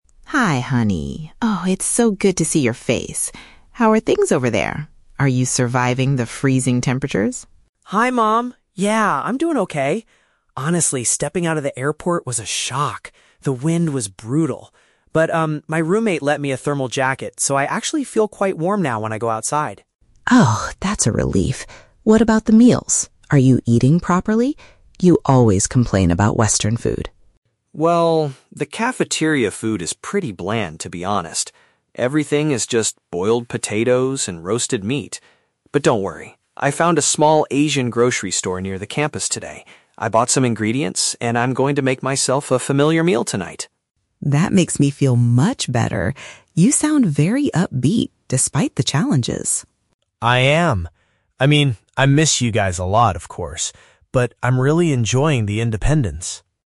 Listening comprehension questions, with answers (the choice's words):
Listen to the video call conversation between an international student and his mother. Read the questions below and choose the correct answer (A, B, or C) for each.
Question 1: How is the man dealing with the freezing temperatures?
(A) He avoids going outside and stays in his room.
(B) He is wearing a special item of clothing borrowed from a friend.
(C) He purchased a heavy winter coat immediately at the airport.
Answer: He is wearing a special item of clothing borrowed from a friend.

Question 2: Why is the man planning to prepare his own dinner tonight?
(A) He wants to save money because the cafeteria is expensive.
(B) He finds the meals provided at the university rather tasteless.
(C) He wants to cook a special traditional dish for his new roommate.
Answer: He finds the meals provided at the university rather tasteless.

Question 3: How does the man feel overall about his new life so far?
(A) He is miserable because the initial culture shock was too strong.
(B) He feels terribly lonely without his family around him.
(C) He is feeling positive and appreciates his new self-reliance.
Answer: He is feeling positive and appreciates his new self-reliance.

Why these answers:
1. The Key (Correct): The son says, "my roommate lent me a thermal jacket." (Paraphrased: roommate = friend, lent me = borrowed, thermal jacket = special item of clothing). The Trap: Option (C) is incorrect. He mentions the "airport" and "shock," but he didn't buy a coat there. Not mentioned: Option (A) is plausible for someone who hates the cold, but it is not mentioned.
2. The Key (Correct): He describes the cafeteria food as "pretty bland," which means it has no strong flavor or is "tasteless." Because of this, he went to an Asian grocery store to cook for himself. The Trap: Option (C) mentions his "roommate", but the roommate is only mentioned earlier regarding the jacket. He is cooking for himself ("make myself a familiar meal"). Not mentioned: Option (A) is a common reason for students to cook, but the cost of the food is never discussed.
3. The Key (Correct): The mother says he sounds "upbeat" (positive), and he confirms by saying he is "really enjoying the independence" (self-reliance). The Trap: Option (B) is incorrect. He says "I miss you guys a lot", but he immediately contrasts it with "But I'm really enjoying...", showing he is not overcome by loneliness. Option (A) is also a trap; he mentions a "shock" at the airport, but he is not miserable now.

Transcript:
Mom: Hi, honey! Oh, it's so good to see your face. How are things over there? Are you surviving the freezing temperatures?
Son: Hi, Mom! Yeah, I'm doing okay. Honestly, stepping out of the airport was a shock. The wind was brutal. But, um, my roommate lent me a thermal jacket, so I actually feel quite warm now when I go outside.
Mom: Oh, that's a relief. What about the meals? Are you eating properly? You always complain about Western food.
Son: Well... the cafeteria food is pretty bland, to be honest. Everything is just boiled potatoes and roasted meat. But don't worry! I found a small Asian grocery store near the campus today. I bought some ingredients and I'm going to make myself a familiar meal tonight.
Mom: That makes me feel much better. You sound very upbeat, despite the challenges.
Son: I am! I mean, I miss you guys a lot, of course. But I'm really enjoying the independence.